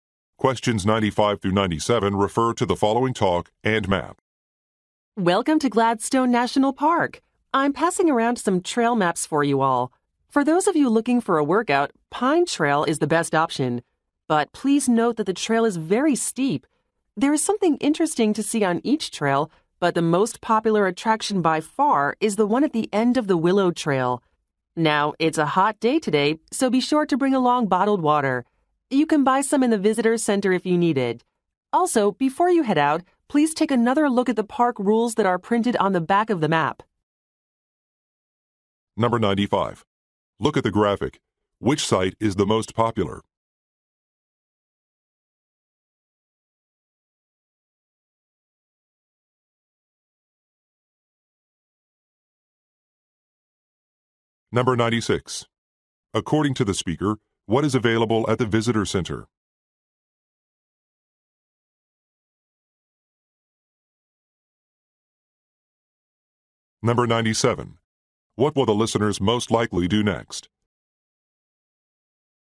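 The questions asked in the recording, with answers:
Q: According to the speaker, what is available at the visitor center?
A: Bottled water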